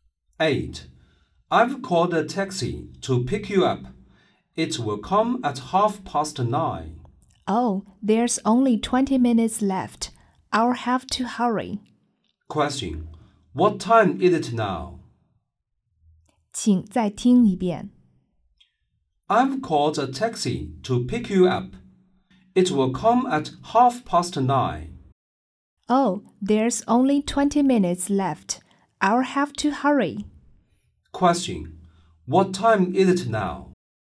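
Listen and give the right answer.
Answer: 9:10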